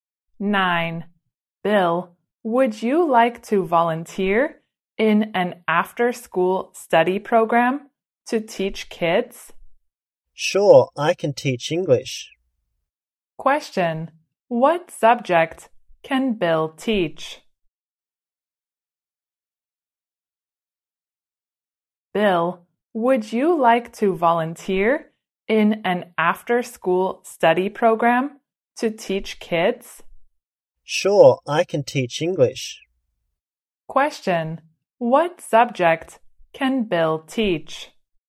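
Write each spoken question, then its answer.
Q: What subject can Bill teach?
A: English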